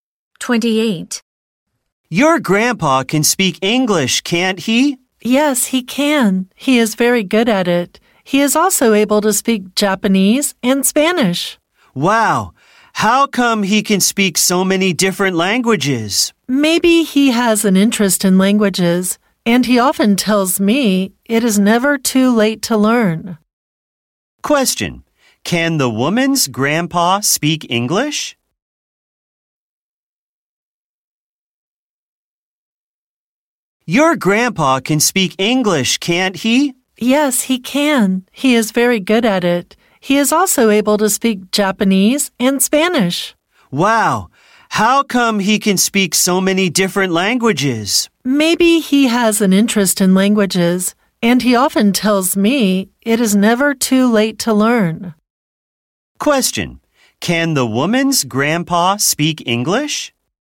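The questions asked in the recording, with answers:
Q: Question: Can the woman's grandpa speak English?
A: Yes, he can.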